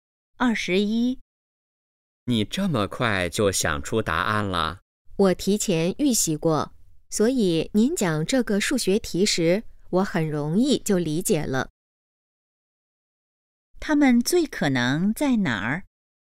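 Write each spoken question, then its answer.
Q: 他们最可能在哪儿?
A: 教室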